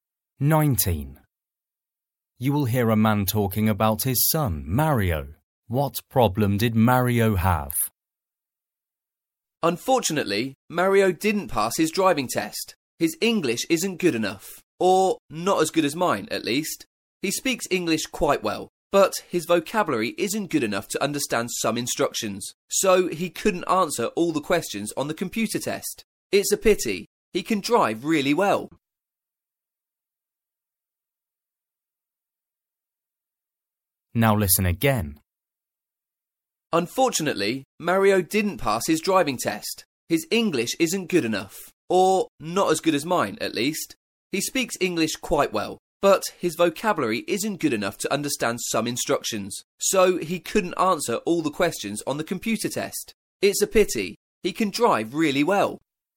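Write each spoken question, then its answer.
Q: What problem did Mario have?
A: He failed his driving test because his English vocabulary wasn't good enough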